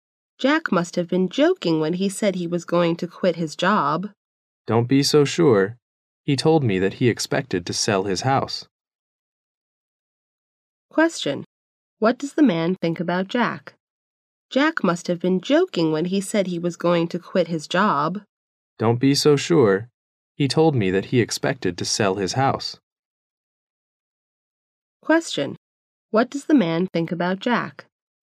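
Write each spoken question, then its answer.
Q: What does the man think about Jack?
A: Jack was serious about quitting his job.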